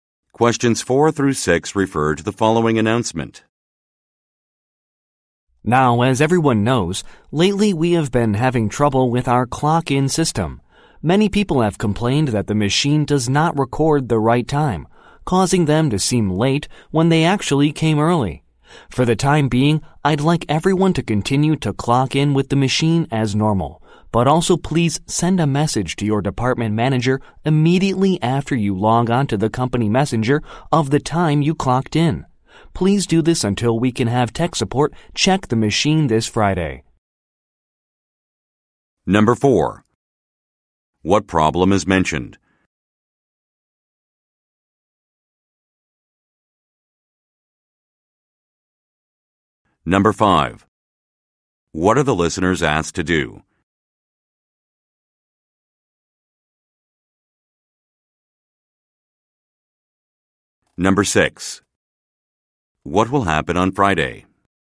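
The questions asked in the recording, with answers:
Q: What problem is mentioned?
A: The clock-in machine does not record the right time

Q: What are the listeners asked to do?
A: Message their department manager the time they clocked in

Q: What will happen on Friday?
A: Tech support will check the machine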